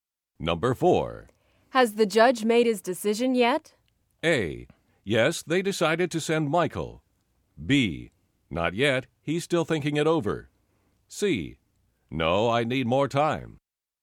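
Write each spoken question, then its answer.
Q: Has the judge made his decision yet?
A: B: Not yet, he's still thinking it over.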